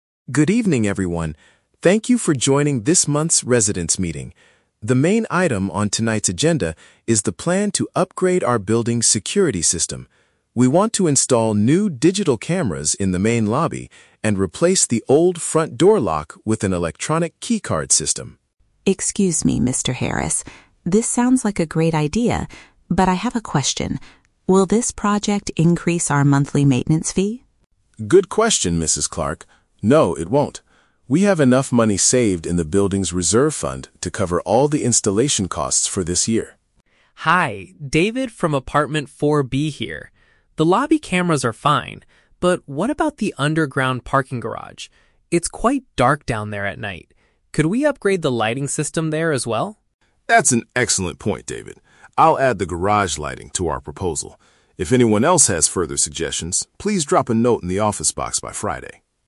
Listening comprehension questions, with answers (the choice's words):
Listen to a conversation at a residents' meeting. Choose the correct answer (A, B, or C) for each question.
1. What are the two main security upgrades initially proposed by the manager?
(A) Hiring more security guards and closing the gates earlier.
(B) Putting cameras in the entrance hall and using keycards for the main door.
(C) Changing the digital passwords for all the individual apartment doors.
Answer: Putting cameras in the entrance hall and using keycards for the main door.

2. How will the building pay for the new security system?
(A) By asking each apartment to pay a special installation fee.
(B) By increasing the monthly maintenance bills next month.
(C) By using funds that the building has already saved up.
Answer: By using funds that the building has already saved up.

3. What does David suggest the management do?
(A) Install additional security cameras in the parking area.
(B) Improve the brightness of the area where people leave their cars.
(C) Organize another meeting on Friday to discuss the dark garage.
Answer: Improve the brightness of the area where people leave their cars.

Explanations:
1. Mr. Harris mentions installing cameras in the "main lobby" (entrance hall) and replacing the lock with an "electronic keycard system". Option B paraphrases this exactly. Option A is not mentioned. Option C is the Trap: They are replacing the lock for the "front door" of the building, not the doors of individual apartments.
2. Mr. Harris reassures Mrs. Clark by saying they have "enough money saved in the building's reserve fund". Option C expresses this meaning using synonyms (saved in reserve fund = funds already saved up). Option A is not mentioned. Option B is the Trap: Mrs. Clark asks if it will increase the "monthly maintenance fee", but Mr. Harris explicitly says "No, it won't."
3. David complains that the underground parking garage is "dark" and asks to "upgrade the lighting system". Option B paraphrases this perfectly (improve the brightness = upgrade the lighting; area where people leave their cars = parking garage). Option A is the Trap: David mentions the parking garage, but he wants lighting, not cameras installed. Option C is also a trap: "Friday" is the deadline for submitting comments (drop a note), not the next meeting date.

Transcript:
Mr. Harris (Manager): Good evening, everyone. Thank you for joining this month's residents' meeting. The main item on tonight's agenda is the plan to upgrade our building's security system. We want to install new digital cameras in the main lobby and replace the old front door lock with an electronic keycard system.
Mrs. Clark (Resident 1): Excuse me, Mr. Harris. This sounds like a great idea, but I have a question. Will this project increase our monthly maintenance fee?
Mr. Harris: Good question, Mrs. Clark. No, it won't. We have enough money saved in the building's reserve fund to cover all the installation costs for this year.
David (Resident 2): Hi, David from apartment 4B here. The lobby cameras are fine, but what about the underground parking garage? It's quite dark down there at night. Could we upgrade the lighting system there as well?
Mr. Harris: That's an excellent point, David. I'll add the garage lighting to our proposal. If anyone else has further suggestions, please drop a note in the office box by Friday.